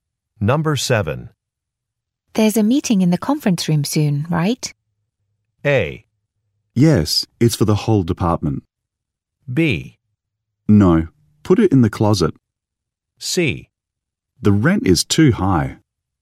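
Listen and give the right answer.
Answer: A: Yes, it's for the whole department.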